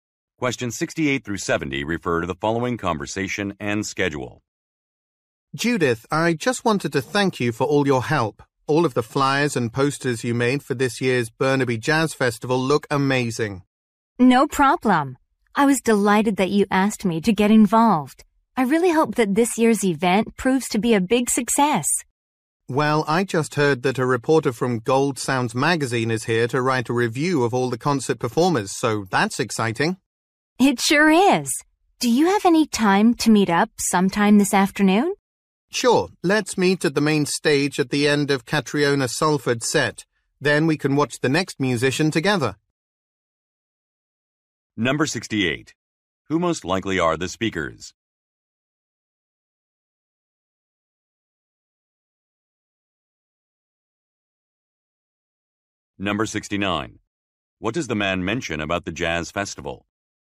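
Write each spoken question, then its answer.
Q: What does the man mention about the jazz festival?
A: A magazine reporter is there to review the performers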